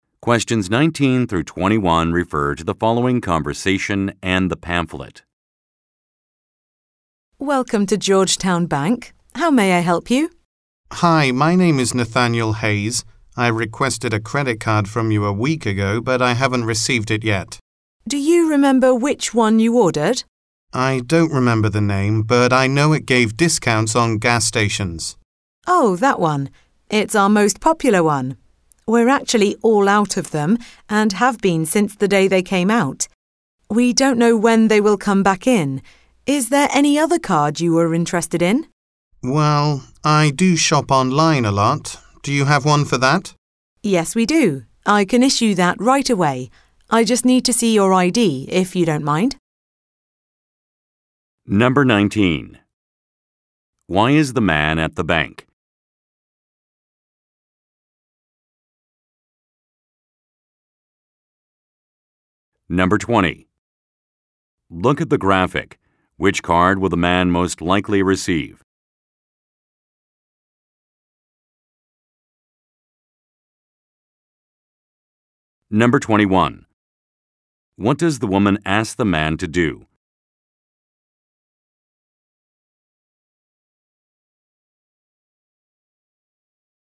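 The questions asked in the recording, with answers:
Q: Why is the man at the bank?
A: To ask about a credit card he requested but hasn't received

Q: What does the woman ask the man to do?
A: Show his ID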